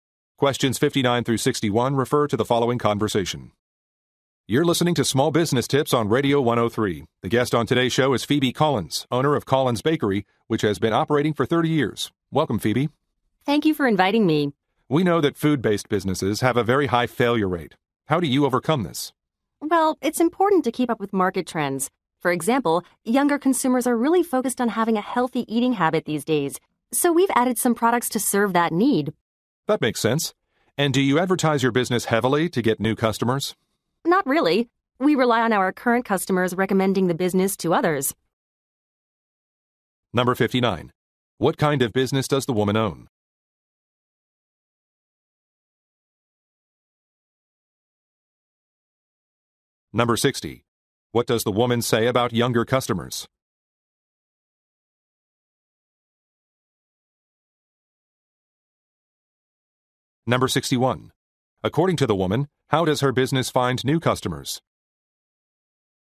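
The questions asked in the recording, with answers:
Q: What kind of business does the woman own?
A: A bakery

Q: What does the woman say about younger customers?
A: They are focused on healthy eating habits

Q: According to the woman, how does her business find new customers?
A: Current customers recommend it to others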